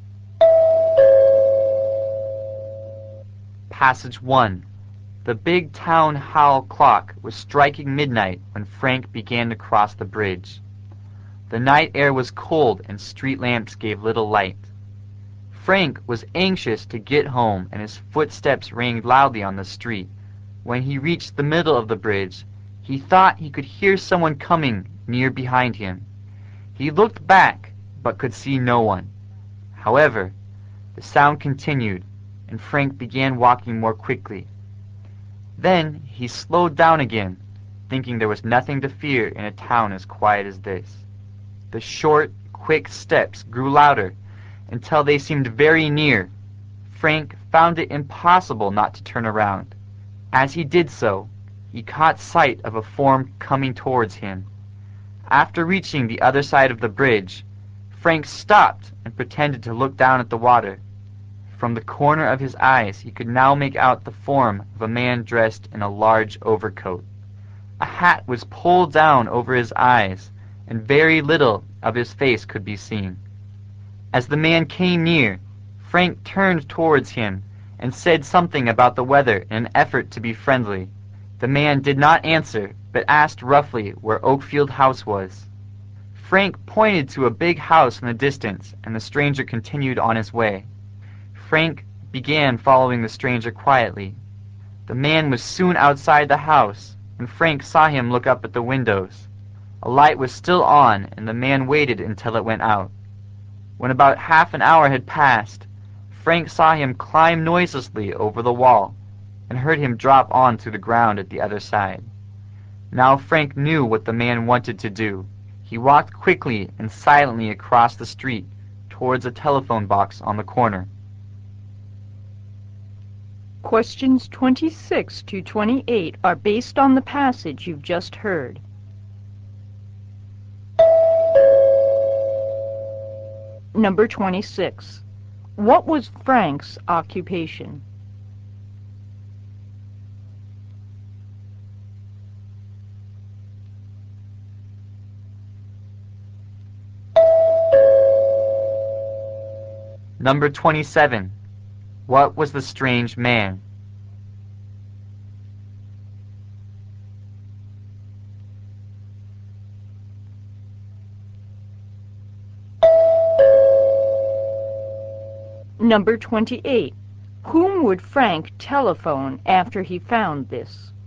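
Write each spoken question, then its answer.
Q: Whom would Frank telephone after he found this?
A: The police.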